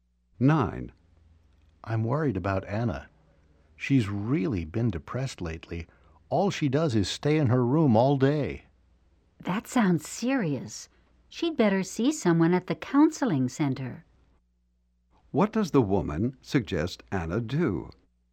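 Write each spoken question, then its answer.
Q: What does the woman suggest Anna do?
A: See someone at the counseling center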